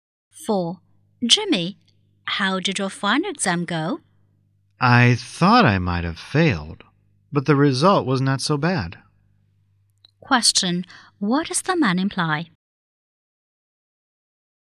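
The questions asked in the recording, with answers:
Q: What does the man imply?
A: He did better in the exam than he expected.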